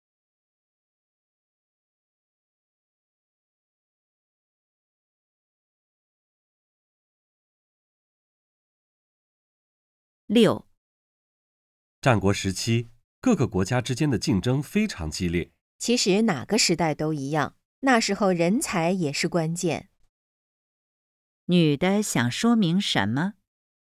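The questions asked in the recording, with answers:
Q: 女的想说明什么?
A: 哪个时代人才都是关键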